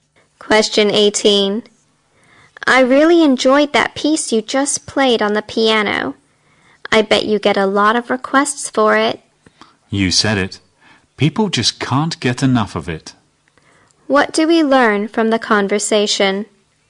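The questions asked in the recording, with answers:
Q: What do we learn from the conversation?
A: The piano piece is very popular.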